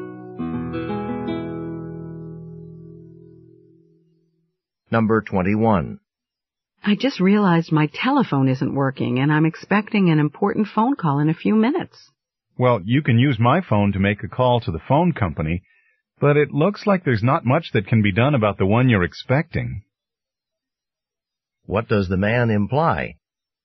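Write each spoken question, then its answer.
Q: What does the man imply?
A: The phone probably won't be fixed in time for the call she is expecting.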